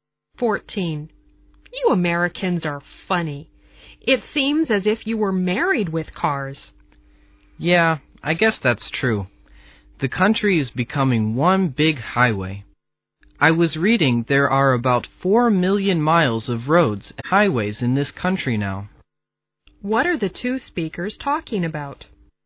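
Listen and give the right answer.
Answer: Americans' dependence on cars and highways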